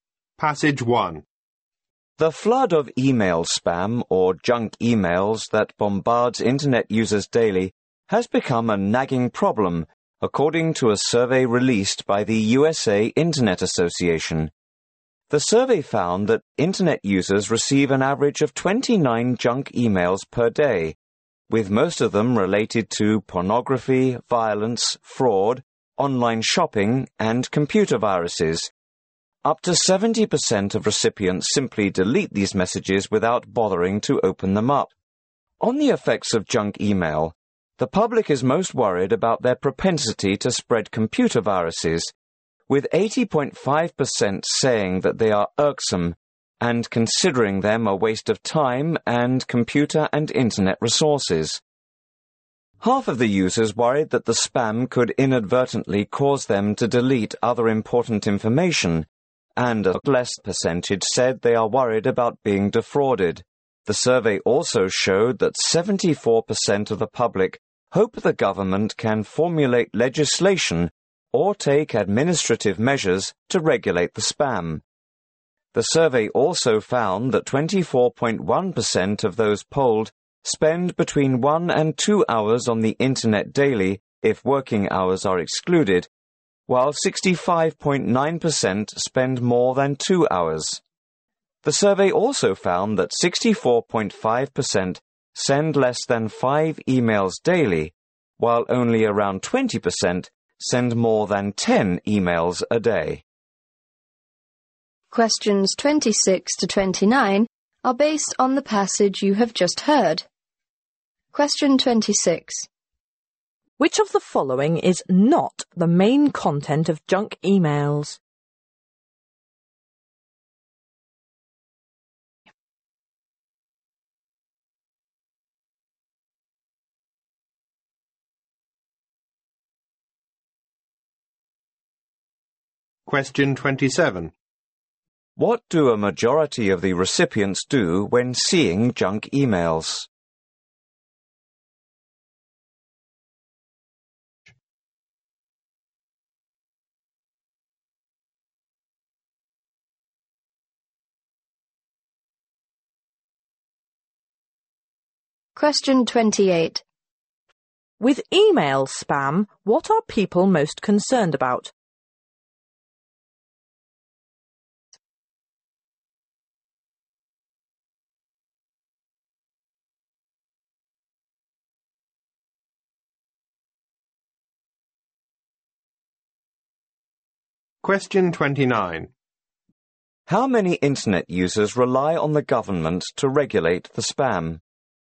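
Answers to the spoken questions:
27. Delete them without opening them
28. That they spread computer viruses
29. 74%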